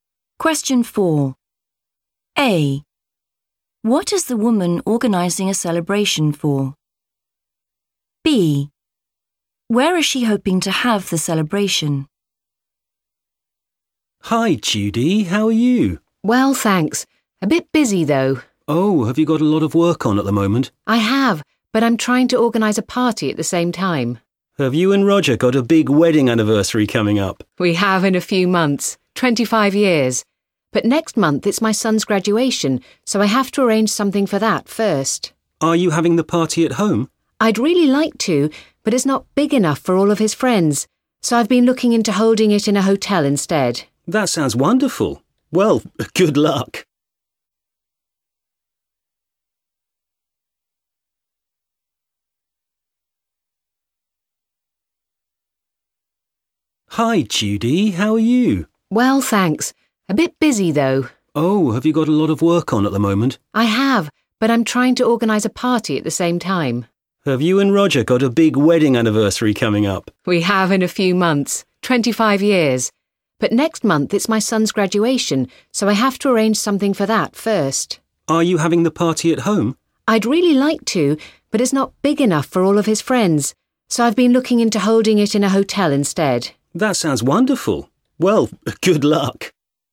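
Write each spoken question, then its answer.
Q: What is the woman organising a celebration for?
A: her son's graduation

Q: Where is she hoping to have the celebration?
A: in a hotel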